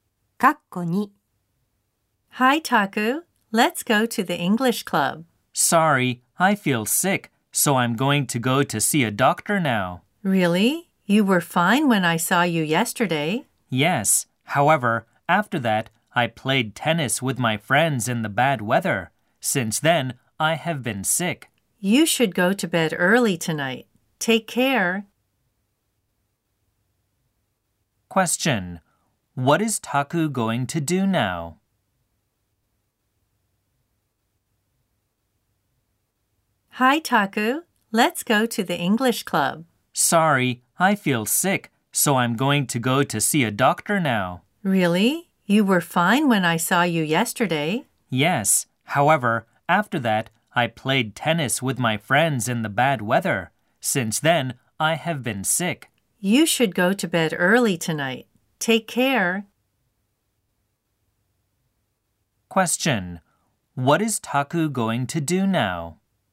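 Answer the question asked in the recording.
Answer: He is going to go to see a doctor.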